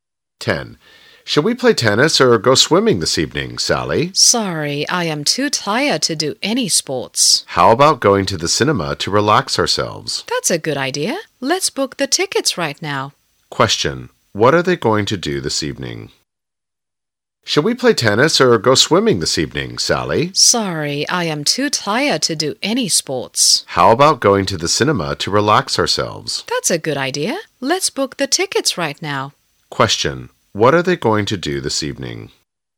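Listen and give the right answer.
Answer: Go to the cinema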